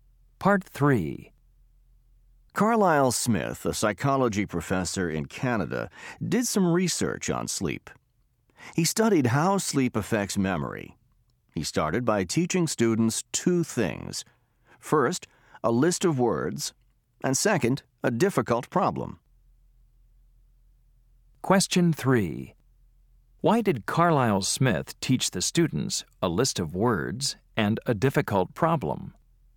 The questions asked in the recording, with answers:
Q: Why did Carlisle Smith teach the students a list of words and a difficult problem?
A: Then Smith tested the students to see how much they remembered of the list of words and the problem.